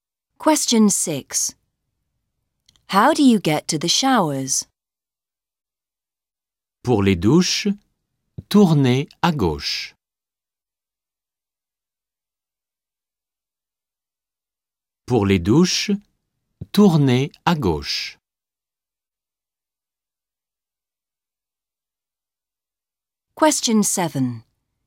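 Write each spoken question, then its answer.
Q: How do you get to the showers?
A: Turn left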